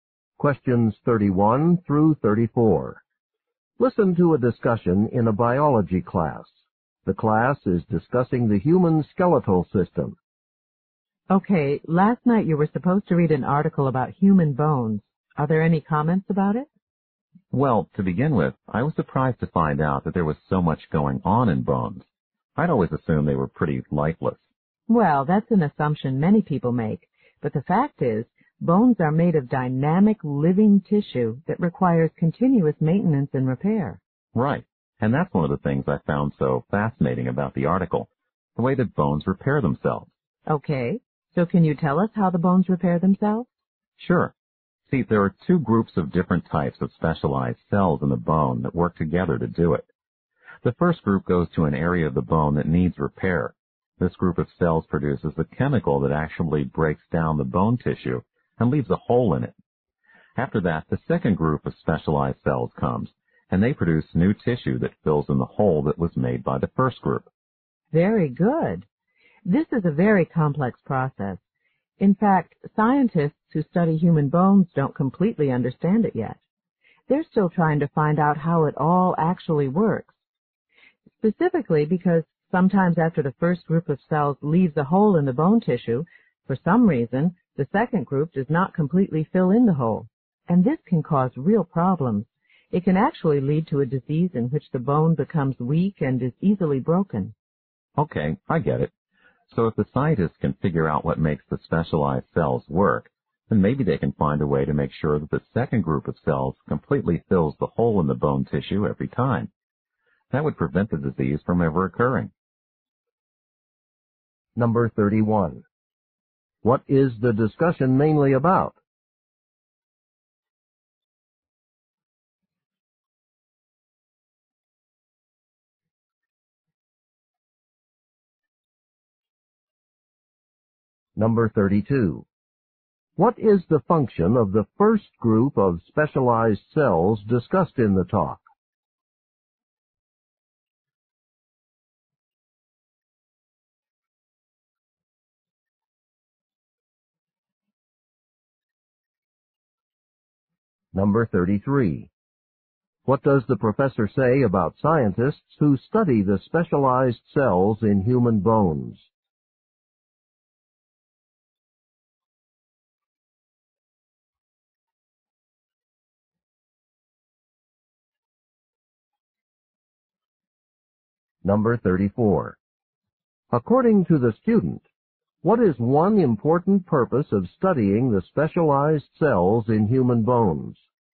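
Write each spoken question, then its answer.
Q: What is the discussion mainly about?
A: How bones repair themselves

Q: What is the function of the first group of specialized cells discussed in the talk?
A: To break down bone tissue, leaving a hole

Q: What does the professor say about scientists who study the specialized cells in human bones?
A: They don't yet completely understand how the process works

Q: According to the student, what is one important purpose of studying the specialized cells in human bones?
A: To prevent a disease that makes bones weak and easily broken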